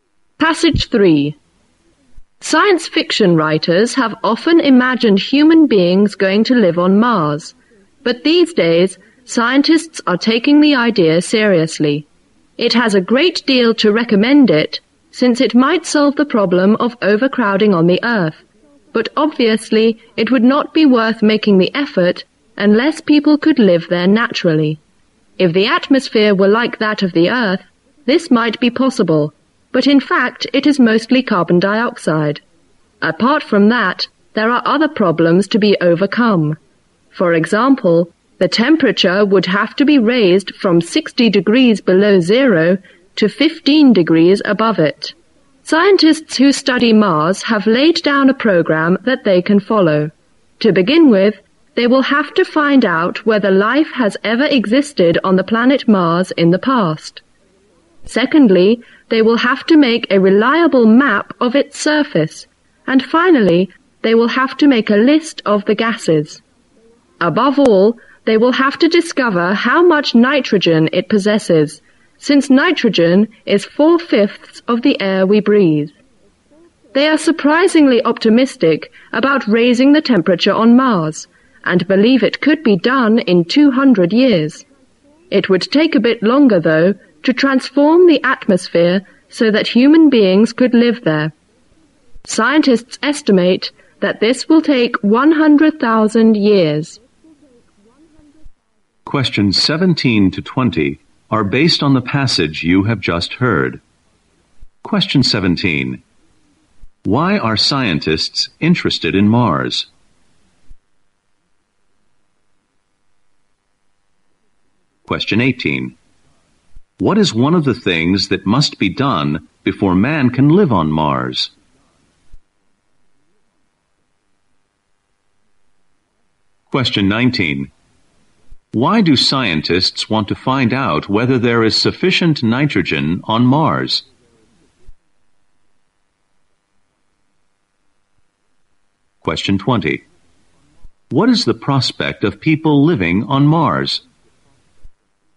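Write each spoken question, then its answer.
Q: Why are scientists interested in Mars?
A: It might solve overcrowding on Earth

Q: Why do scientists want to find out whether there is sufficient nitrogen on Mars?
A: Nitrogen is four-fifths of the air we breathe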